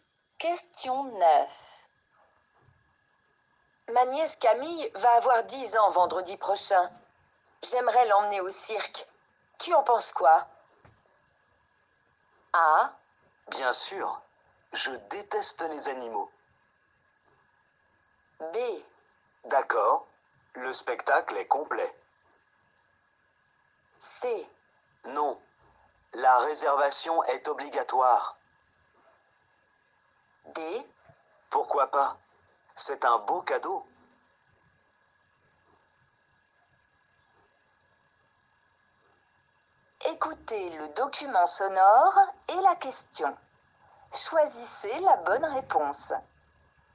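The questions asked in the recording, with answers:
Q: Tu en penses quoi?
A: D: Pourquoi pas? C'est un beau cadeau.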